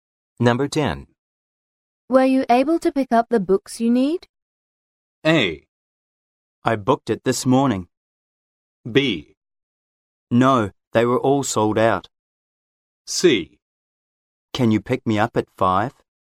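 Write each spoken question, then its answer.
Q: Were you able to pick up the books you need?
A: B: No, they were all sold out.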